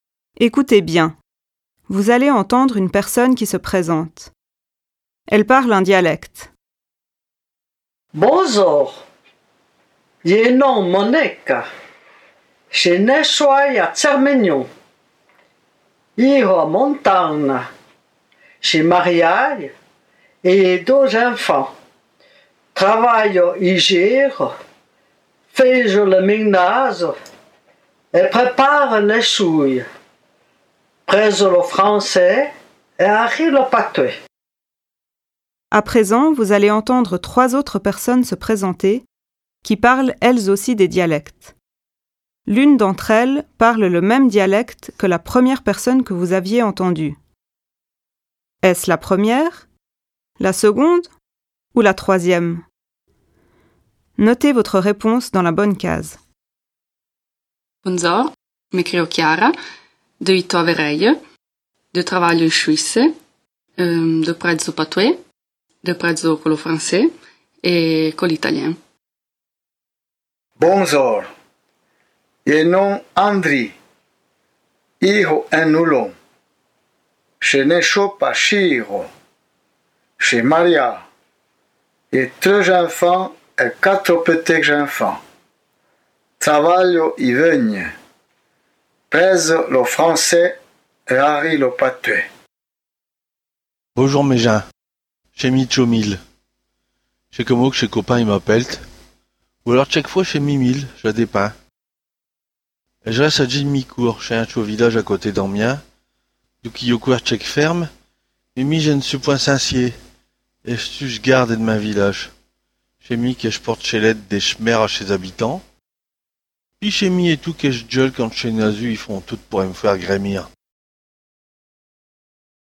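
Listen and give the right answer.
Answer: la seconde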